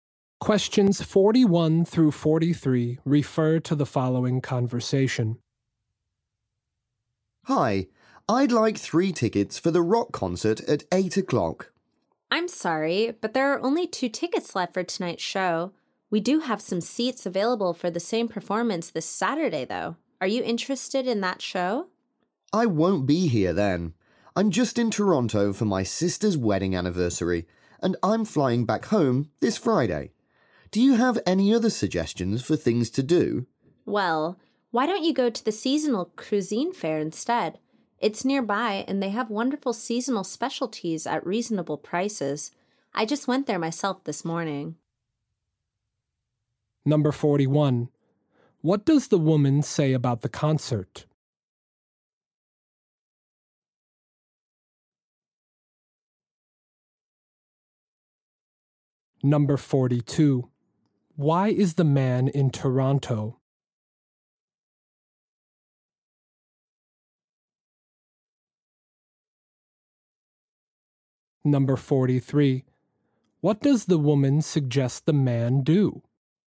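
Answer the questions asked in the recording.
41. There are only 2 tickets left for tonight's show.
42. For his sister's wedding anniversary.
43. Go to the seasonal cuisine fair.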